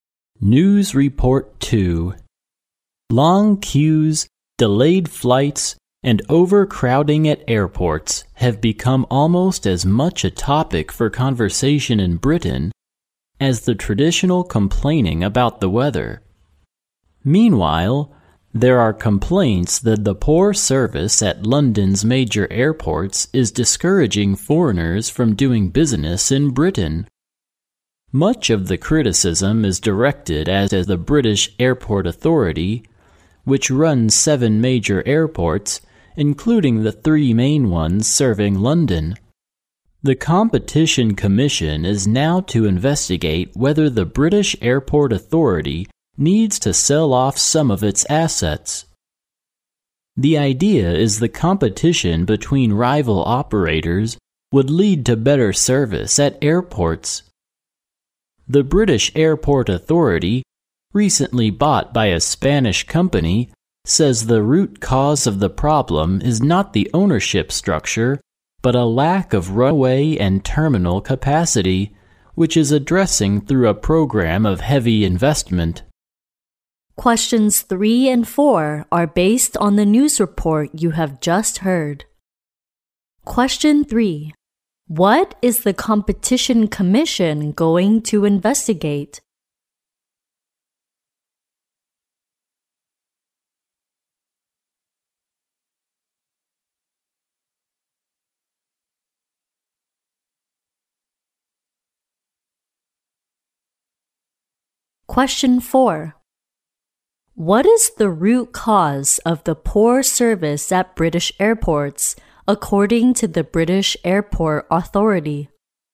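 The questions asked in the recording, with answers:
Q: What is the Competition Commission going to investigate?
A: Whether the British Airport Authority needs to sell off some of its assets

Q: What is the root cause of the poor service at British airports, according to the British Airport Authority?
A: A lack of runway and terminal capacity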